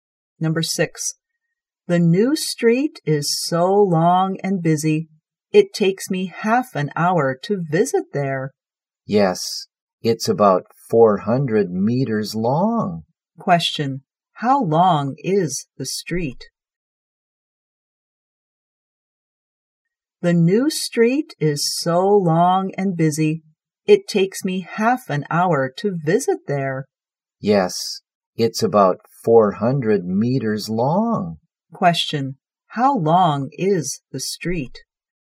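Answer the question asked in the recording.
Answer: About 400 meters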